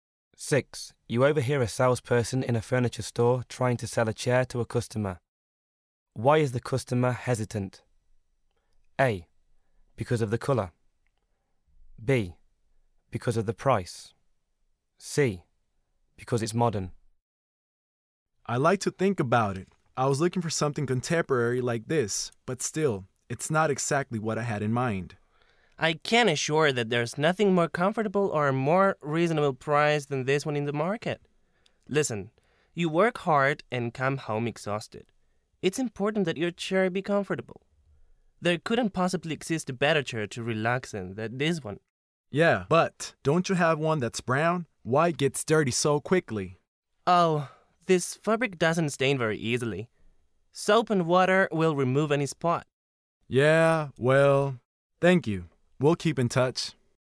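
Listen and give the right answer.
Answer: A: Because of the colour.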